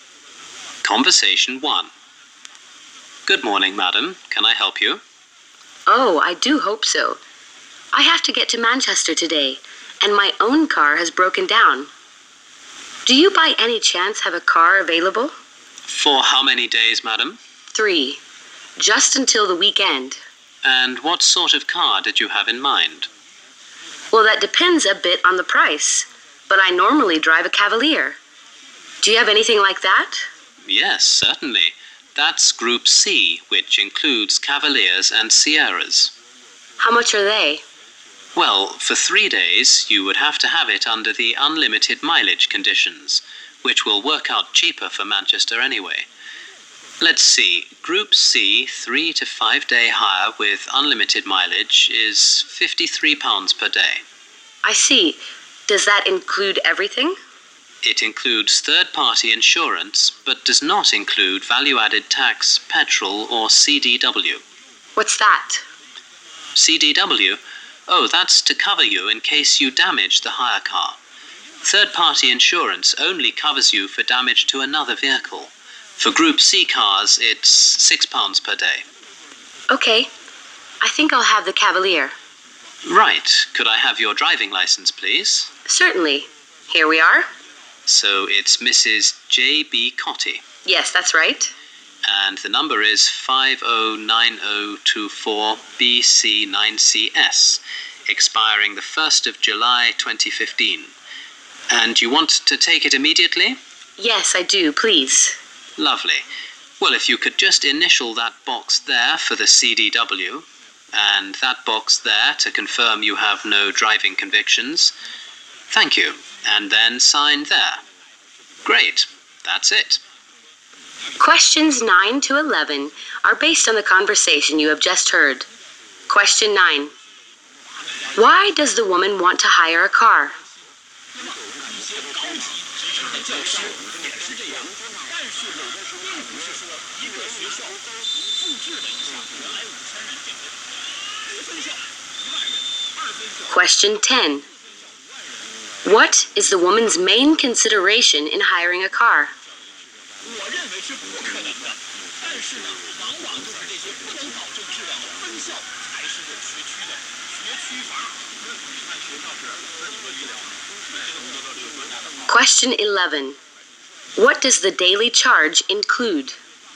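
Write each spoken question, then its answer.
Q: Why does the woman want to hire a car?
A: Her own car has broken down and she has to get to Manchester today.

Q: What is the woman's main consideration in hiring a car?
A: The price.

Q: What does the daily charge include?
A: Third-party insurance.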